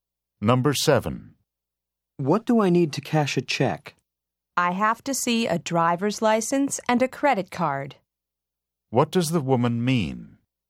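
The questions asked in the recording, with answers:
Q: What does the woman mean?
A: A driver's license and a credit card are needed.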